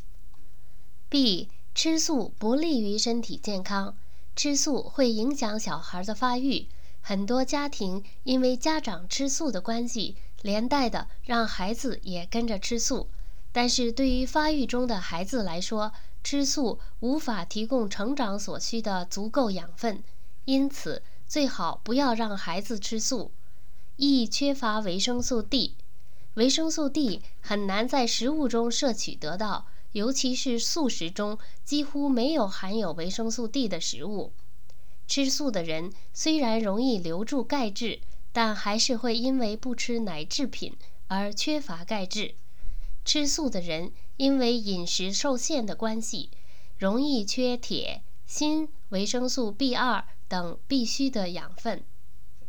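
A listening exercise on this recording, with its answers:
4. 小孩吃素有什么危害?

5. 素食者缺钙的原因是什么?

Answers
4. 影响发育,无法提供成长所需的足够养分
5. 因为不吃奶制品

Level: 3rd Year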